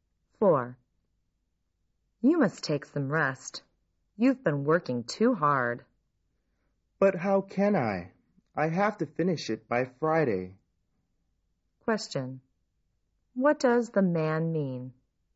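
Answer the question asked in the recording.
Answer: He can't rest because he has to finish his work by Friday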